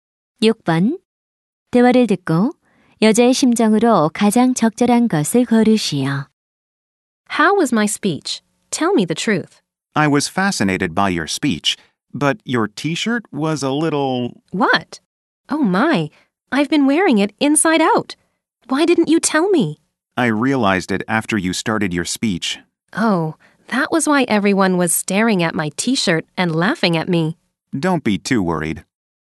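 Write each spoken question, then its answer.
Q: 대화를 듣고 여자의 심정으로 가장 적절한 것을 고르시오.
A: 당황스러움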